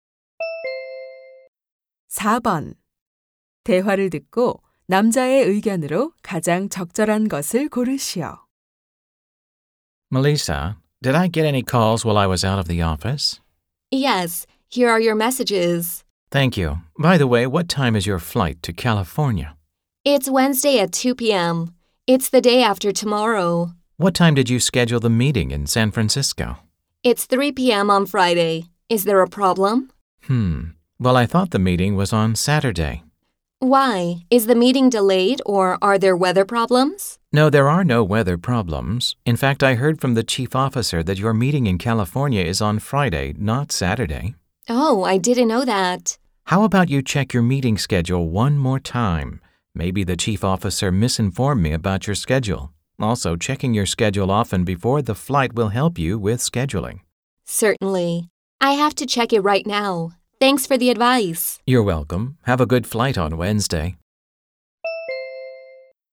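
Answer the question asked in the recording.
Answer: 출장 전에 회의 일정을 자주 확인해야 한다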